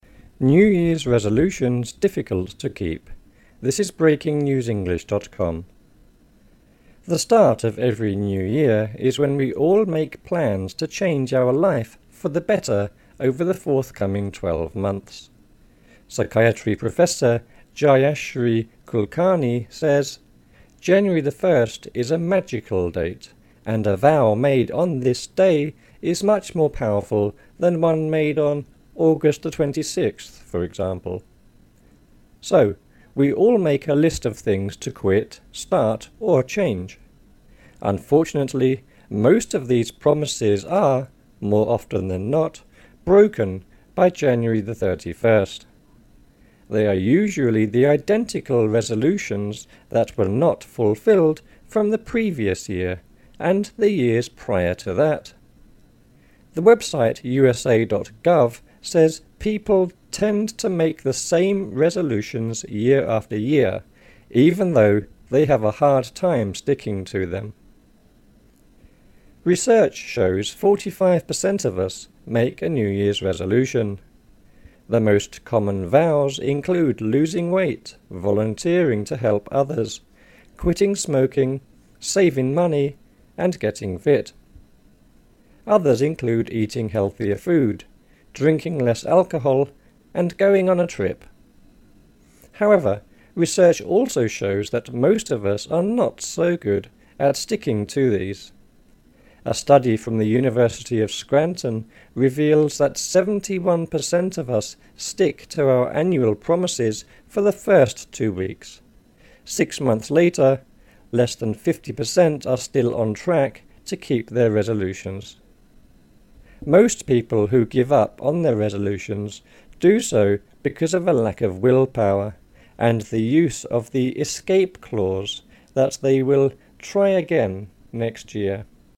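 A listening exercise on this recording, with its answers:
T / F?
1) A professor of psychiatry said January1 was a magical date.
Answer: T

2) The professor said August 26 was the worst date to make promises.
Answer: F

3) The article says most resolutions are broken in January.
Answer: T

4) A website said most people make new resolutions every year.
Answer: F

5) Around 45% of us make a New Year's resolution.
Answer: T

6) One of the most common resolutions is to do voluntary work.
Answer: T

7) Around 71% of us keep resolutions for over 3 weeks.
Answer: F

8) The article said people give up because they get bored.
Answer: F

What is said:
New Year's resolutions difficult to keep
SKY for New Year's card
The start of every New Year is when we all make plans to change our life for the better over the forthcoming twelve months. Psychiatry professor Jayashri Kulkarni says: "January 1 is a 'magical' date and a vow made on this day is much more powerful than one made on August 26, for example." So, we all make a list of things to quit, start or change. 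Unfortunately, most of these promises are, more often than not, broken by January 31st. They are usually the identical resolutions that were not fulfilled from the previous year, and the years prior to that. The website usa.gov says people, "tend to make the same resolutions year after year, even though they have a hard time sticking to them".
Research shows 45 per cent of us make a New Year's resolution. The most common vows include losing weight, volunteering to help others, quitting smoking, saving money, and getting fit. Others include eating healthier food, drinking less alcohol, and going on a trip. However, research also shows that most of us are not so good at sticking to these. A study from the University of Scranton reveals that 71 per cent of us stick to our annual promises for the first two weeks; six months later, less than 50 percent are still on track to keep their resolutions. 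Most people who give up on their resolutions do so because of a lack of willpower and the use of the 'escape clause' that they will 'try again next year'.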